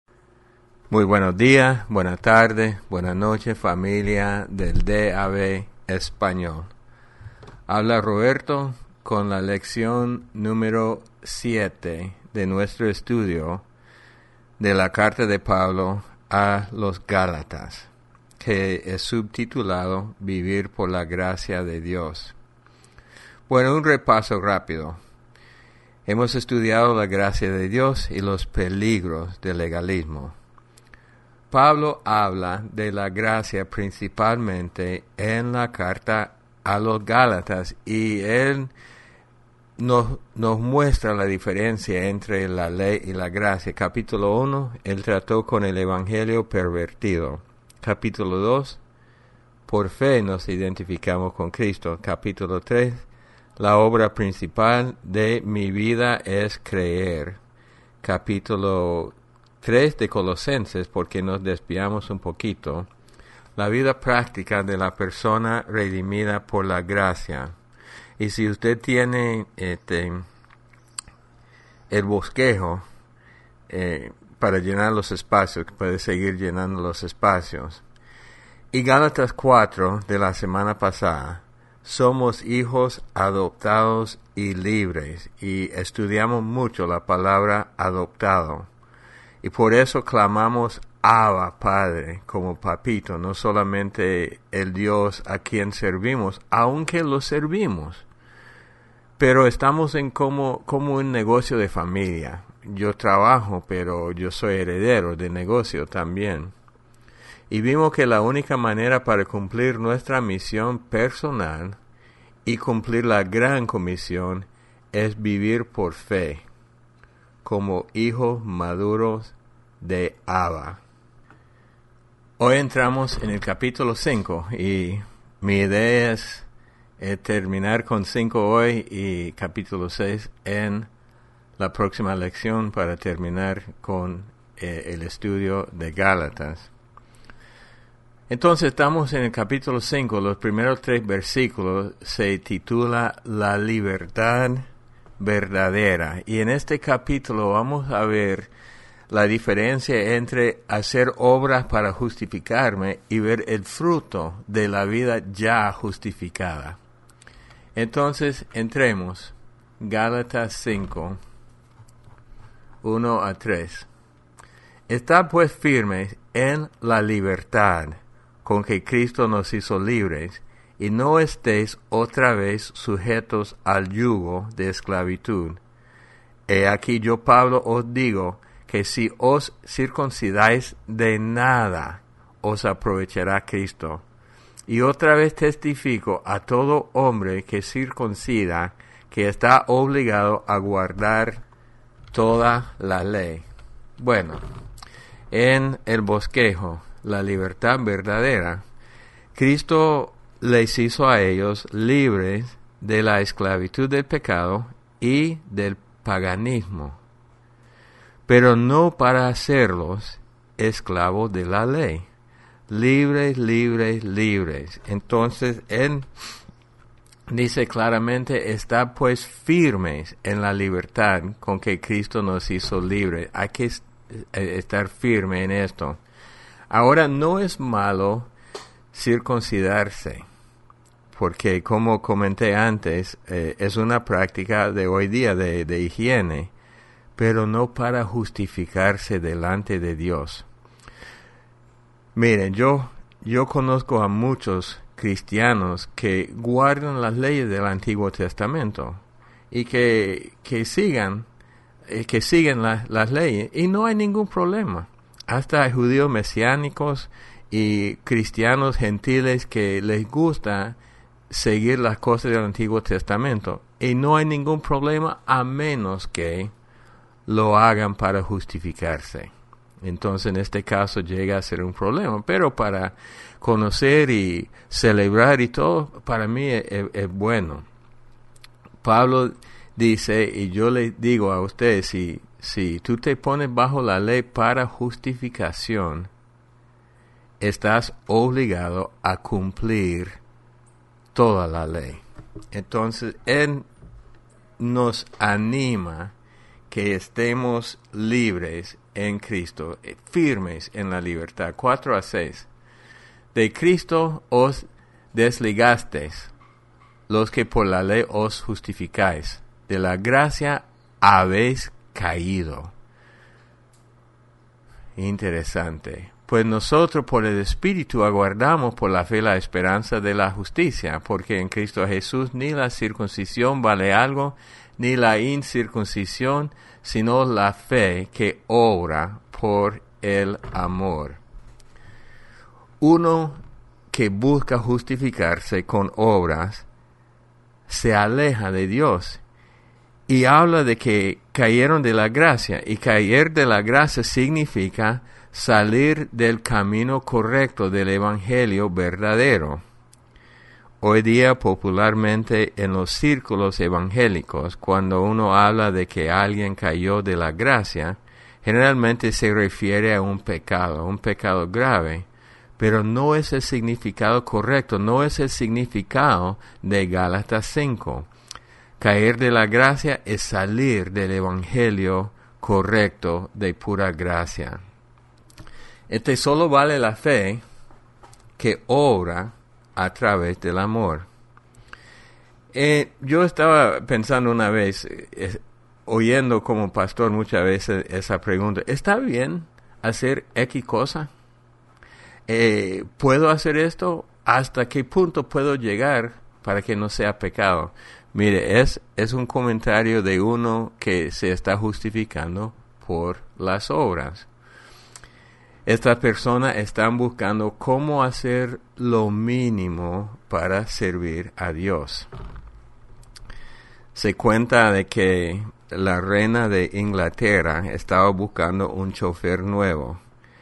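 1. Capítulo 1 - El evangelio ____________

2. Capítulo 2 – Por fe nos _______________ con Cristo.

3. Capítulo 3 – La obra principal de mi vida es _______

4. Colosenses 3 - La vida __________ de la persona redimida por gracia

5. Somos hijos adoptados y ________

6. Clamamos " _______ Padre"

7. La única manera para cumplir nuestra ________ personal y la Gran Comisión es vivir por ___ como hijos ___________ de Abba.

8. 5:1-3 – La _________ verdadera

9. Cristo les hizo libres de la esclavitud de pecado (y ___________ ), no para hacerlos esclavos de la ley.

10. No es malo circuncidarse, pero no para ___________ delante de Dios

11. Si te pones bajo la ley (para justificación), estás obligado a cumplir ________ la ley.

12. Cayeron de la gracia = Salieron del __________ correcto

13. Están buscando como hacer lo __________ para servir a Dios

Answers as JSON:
{"1": "pervertido", "2": "identificamos", "3": "creer", "4": "práctica", "5": "libres", "6": "Abba", "7": "misión; fe; maduros", "8": "libertad", "9": "paganismo", "10": "justificarse", "11": "toda", "12": "camino", "13": "mínimo"}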